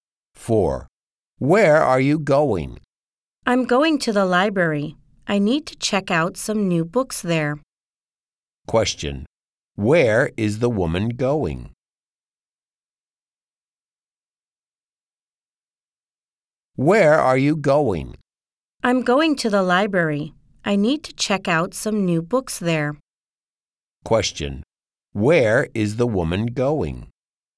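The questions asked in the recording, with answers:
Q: Where is the woman going?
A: To the library.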